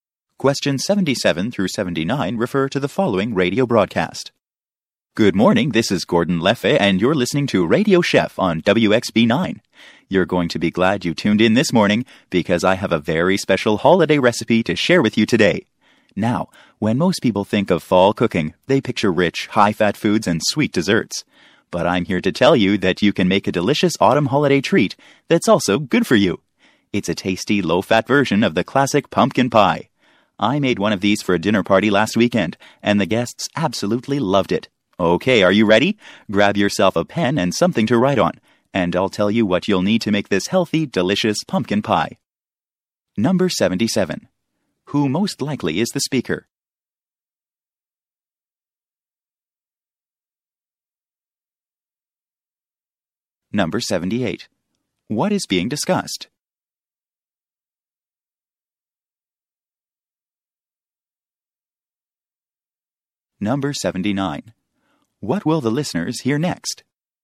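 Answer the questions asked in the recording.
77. A radio cooking show host (a chef)
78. A healthy, low-fat pumpkin pie recipe
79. The ingredients for the pumpkin pie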